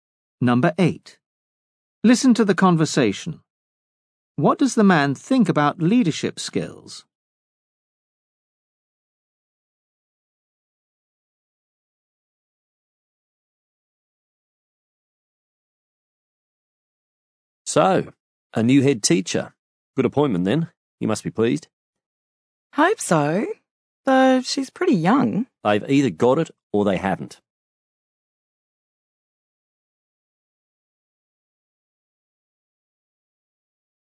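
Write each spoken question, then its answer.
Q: What does the man think about leadership skills?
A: They are innate; people either have them or they don't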